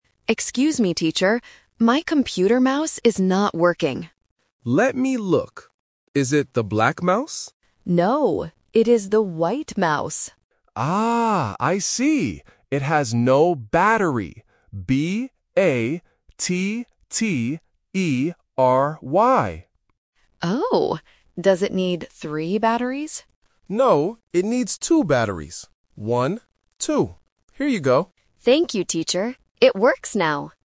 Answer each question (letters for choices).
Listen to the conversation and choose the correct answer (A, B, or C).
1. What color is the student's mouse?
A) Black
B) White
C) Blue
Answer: B

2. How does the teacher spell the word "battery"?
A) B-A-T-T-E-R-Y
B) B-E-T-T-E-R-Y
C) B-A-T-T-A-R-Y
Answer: A

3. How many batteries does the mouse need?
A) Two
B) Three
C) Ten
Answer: A

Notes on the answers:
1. The correct answer is B. The student explicitly says, "it is the white mouse." Option A (Black) is the trap because the teacher asks, "Is it the black mouse?", but the student says "No". Option C (Blue) is not mentioned in the audio.
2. The correct answer is A. The teacher clearly spells the word: "B-A-T-T-E-R-Y". Option B (B-E-T-T-E-R-Y) is a trap because the letters "A" and "E" are often confused by beginners. Option C (B-A-T-T-A-R-Y) is also a trap for similar pronunciation reasons.
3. The correct answer is A. The teacher says, "it needs two batteries. One, two." Option B (Three) is the trap because the student asks, "Does it need three batteries?", but the teacher rejects it by saying "No". Option C (Ten) is just a wrong number.